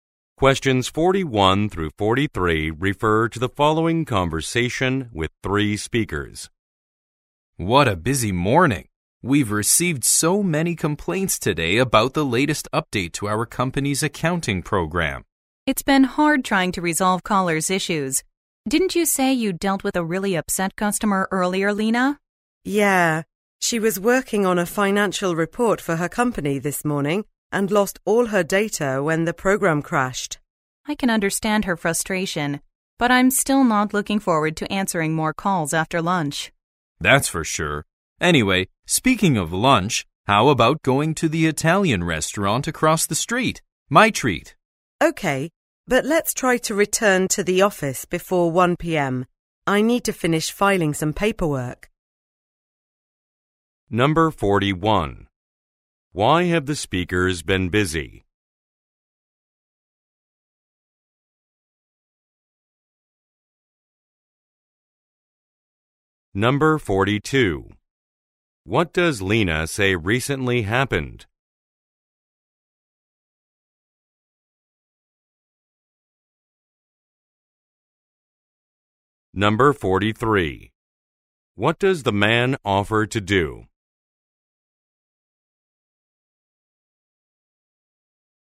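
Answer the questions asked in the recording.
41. They received many complaints about the latest update to the company's accounting program.
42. An upset customer lost all her data when the program crashed.
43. Pay for lunch at the Italian restaurant.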